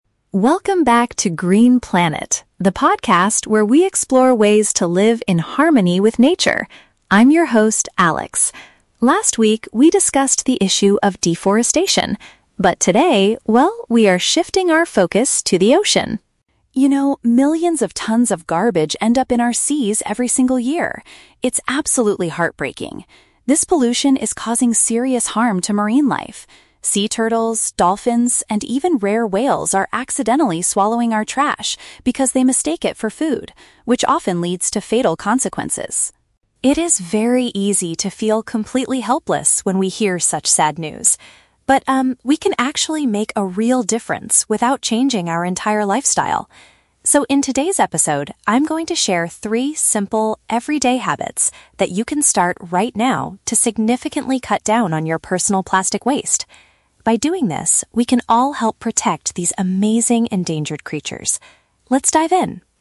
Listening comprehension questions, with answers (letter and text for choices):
Listen to the introduction of an environmental podcast and choose the best answer (A, B, or C) for each question.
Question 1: What is the primary focus of today's podcast episode?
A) The negative impacts of cutting down trees in forests.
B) Methods to reduce the amount of plastic garbage we create.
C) How to organize a successful beach clean-up event.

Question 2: According to the host, why do marine animals consume human trash?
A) They confuse the garbage with their natural diet.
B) They are too helpless to find real fish in the ocean.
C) They are fed by tourists who travel on boats.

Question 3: What does the host believe about solving the ocean pollution problem?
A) People must completely change the way they live.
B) Only large environmental organizations can make a difference.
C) Individuals can help by adopting a few easy routines.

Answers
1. B) Methods to reduce the amount of plastic garbage we create.
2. A) They confuse the garbage with their natural diet.
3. C) Individuals can help by adopting a few easy routines.

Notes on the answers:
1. The host says he will share habits to "cut down on your personal plastic waste." Option B uses synonyms: "reduce" (cut down) and "plastic garbage" (plastic waste).
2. The host states that the animals are swallowing trash because they "mistake it for food." Option A paraphrases this as confusing the garbage with their "natural diet."
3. The host says we can help by starting "three simple, everyday habits." Option C paraphrases this as "adopting a few easy routines."

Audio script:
Host: Welcome back to Green Planet, the podcast where we explore ways to live in harmony with nature. I'm your host, Alex. Last week, we discussed the issue of deforestation. But today, well, we are shifting our focus to the ocean.
You know, millions of tons of garbage end up in our seas every single year. It's absolutely heartbreaking. This pollution is causing serious harm to marine life. Sea turtles, dolphins, and even rare whales are accidentally swallowing our trash because they mistake it for food, which often leads to fatal consequences.
It is very easy to feel completely helpless when we hear such sad news. But, um, we can actually make a real difference without changing our entire lifestyle. So, in today's episode, I'm going to share three simple, everyday habits that you can start right now to significantly cut down on your personal plastic waste. By doing this, we can all help protect these amazing endangered creatures. Let's dive in!